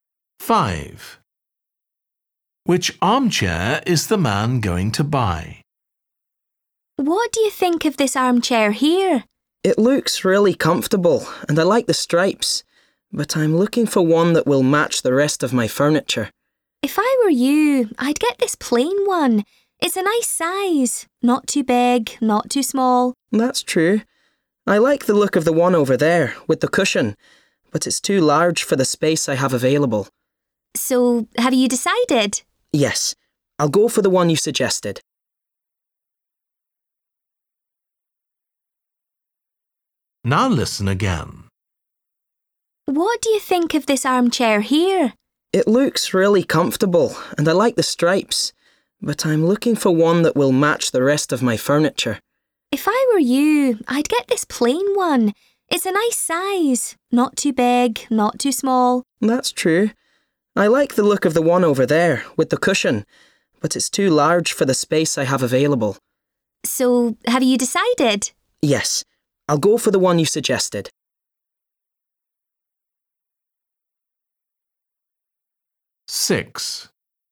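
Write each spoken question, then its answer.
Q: Which armchair is the man going to buy?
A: The plain one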